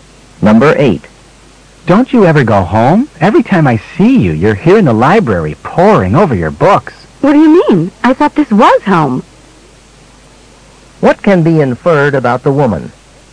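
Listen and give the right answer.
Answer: She spends most of her time in the library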